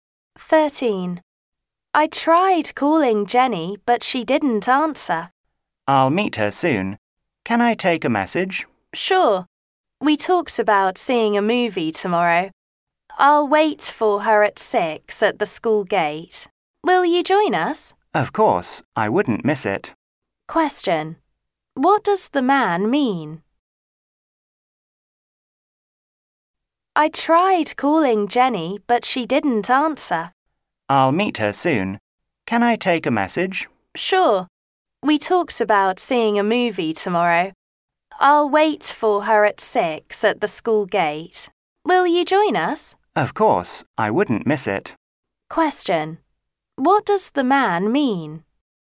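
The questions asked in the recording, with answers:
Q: What does the man mean?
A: He will join them to see the movie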